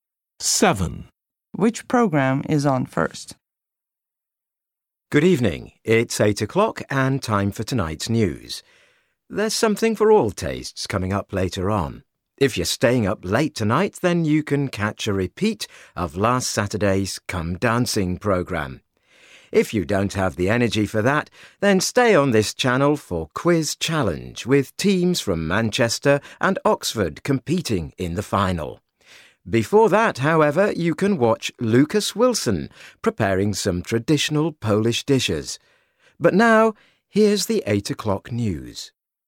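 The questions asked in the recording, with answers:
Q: Which programme is on first?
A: the cookery programme (Lucas Wilson cooking Polish dishes)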